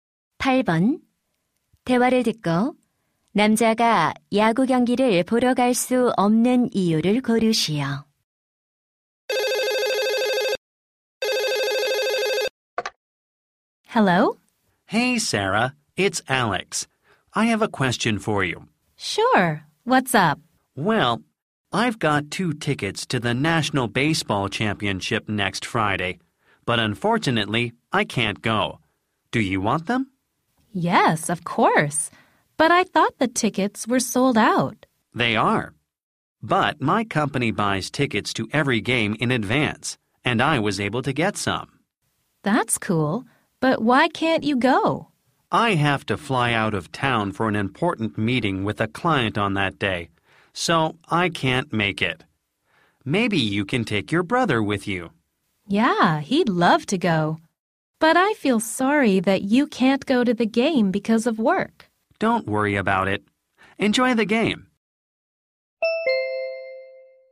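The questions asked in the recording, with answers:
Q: 대화를 듣고 남자가 야구 경기를 보러 갈 수 없는 이유를 고르시오.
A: 고객과의 중요한 회의 때문에 출장을 가야 해서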